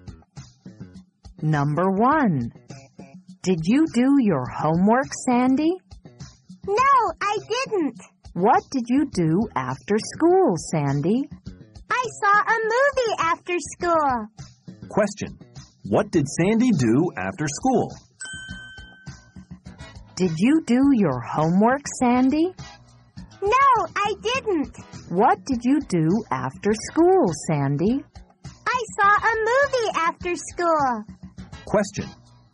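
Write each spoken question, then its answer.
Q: What did Sandy do after school?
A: She saw a movie after school.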